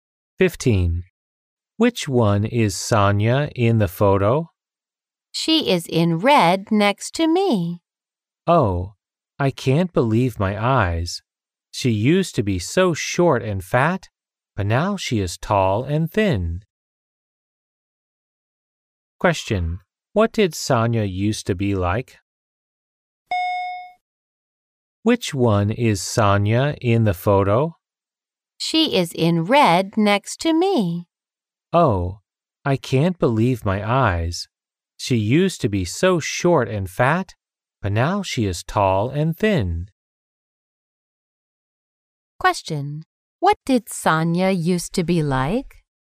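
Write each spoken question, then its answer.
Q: What did Sonia used to be like?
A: Short and fat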